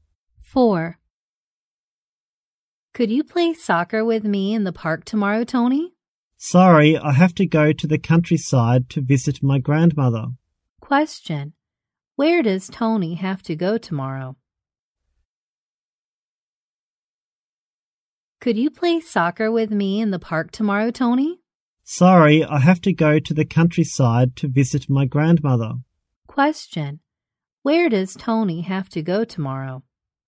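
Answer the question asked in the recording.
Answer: The countryside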